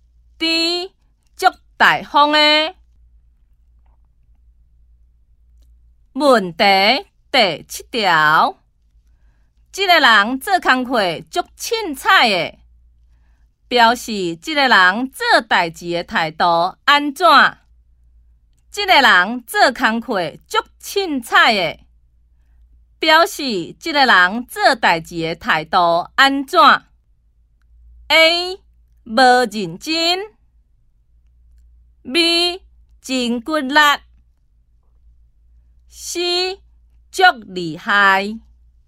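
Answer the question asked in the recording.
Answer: A: 无认真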